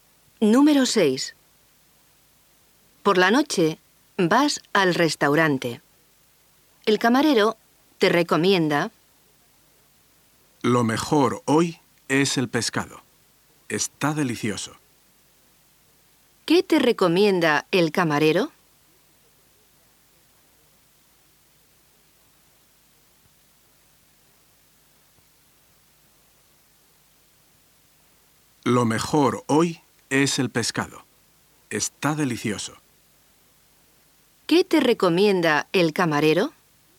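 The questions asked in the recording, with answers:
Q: ¿Qué te recomienda el camarero?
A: El pescado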